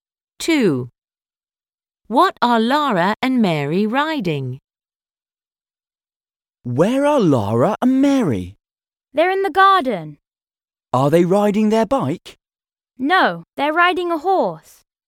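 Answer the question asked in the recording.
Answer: A horse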